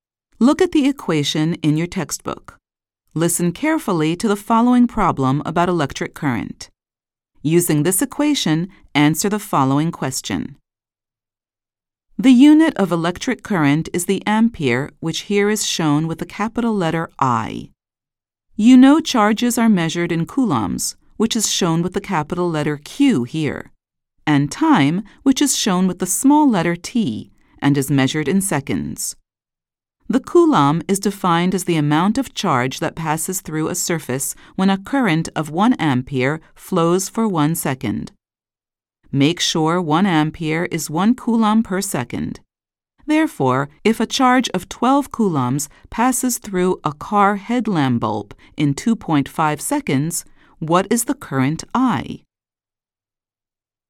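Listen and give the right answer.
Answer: 4.8 amperes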